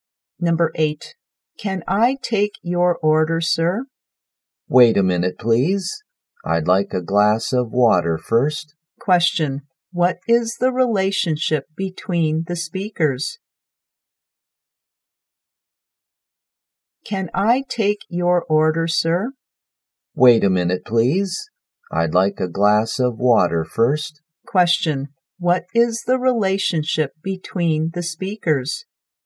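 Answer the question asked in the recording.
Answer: Waiter and customer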